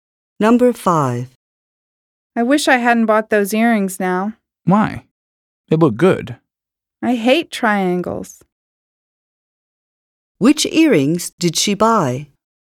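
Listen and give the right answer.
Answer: Triangle earrings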